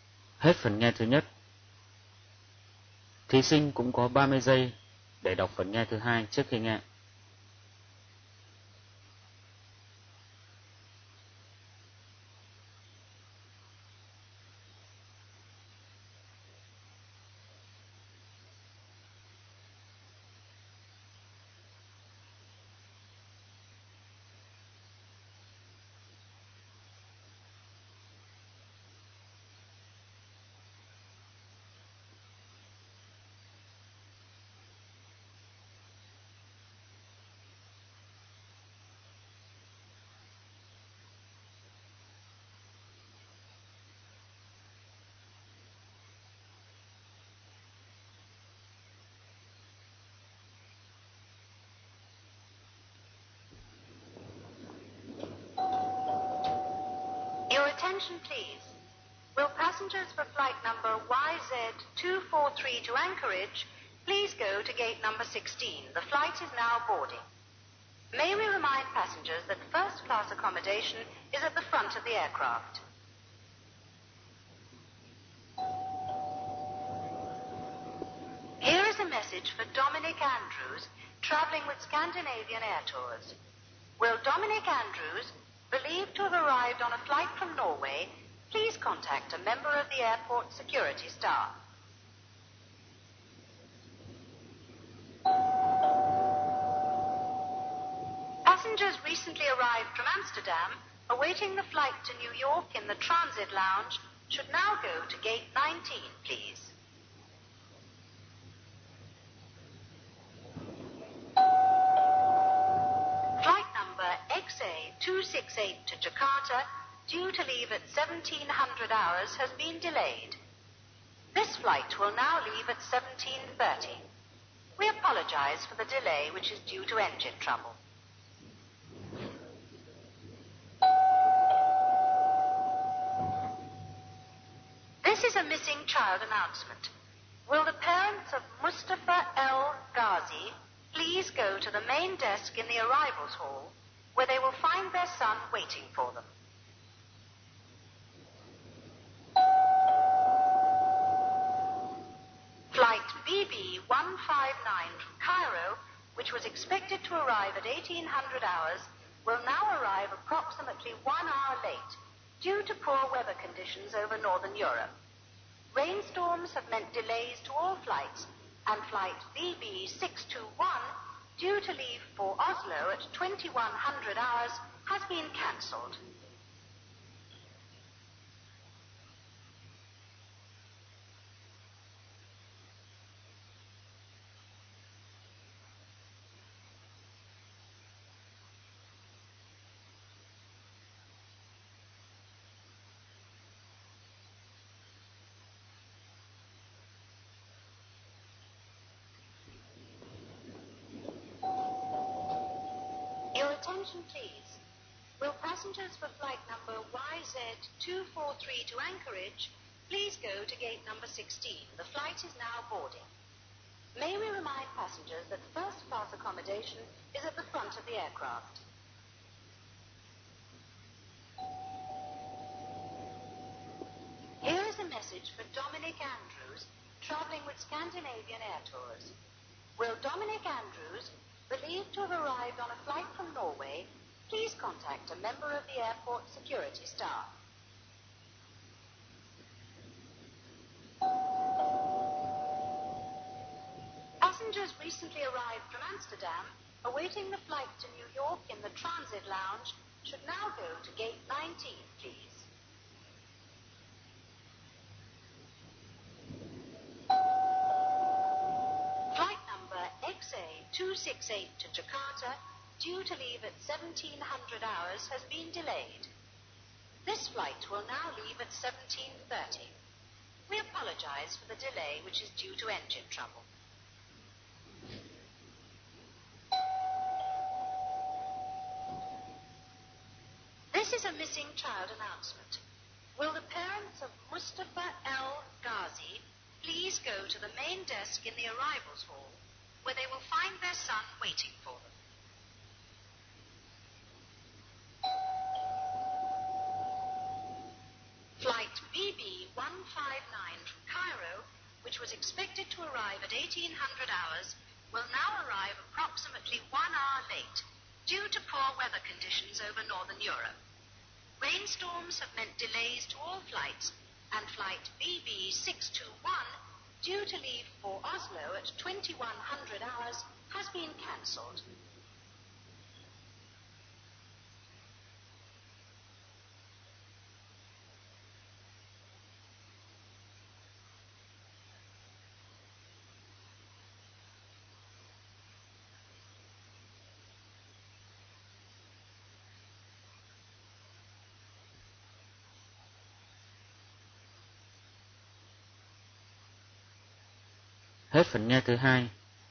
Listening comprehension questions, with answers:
Phần 2. Hãy nghe các thông báo ở sân bay và điền vào chỗ trống trong các câu sau. Chỗ trống thứ nhất là ví dụ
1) Dominic Andrews should contact a member of airport ______________ (1) staff.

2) The flight from Amsterdam to _____________ (2) is at gate 19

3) Flight XA 268 to Jakarta will leave at ________________ (3)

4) The missing child is waiting in the ________________ (4) Hall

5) Flight BB 159 from Cairo will arrive late because of ________________________ (5)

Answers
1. security
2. New York
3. 17.30
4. arrival
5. poor weather (conditions) / rain storm